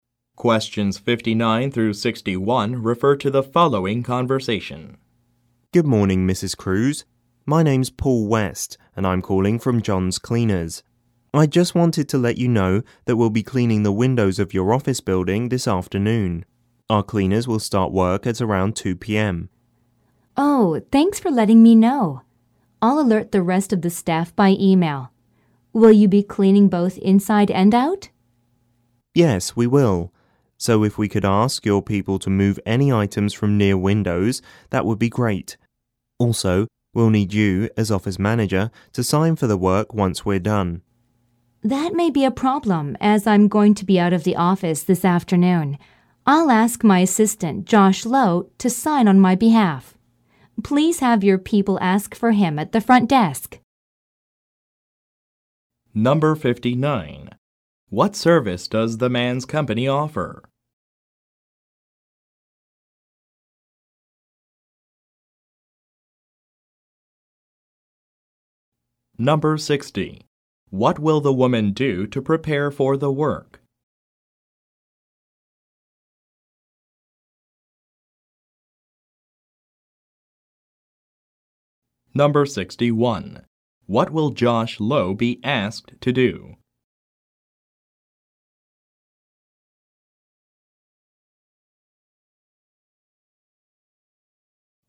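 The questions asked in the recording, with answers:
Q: What service does the man's company offer?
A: Window cleaning

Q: What will the woman do to prepare for the work?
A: Alert the staff by email

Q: What will Josh Lowe be asked to do?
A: Sign for the work on the office manager's behalf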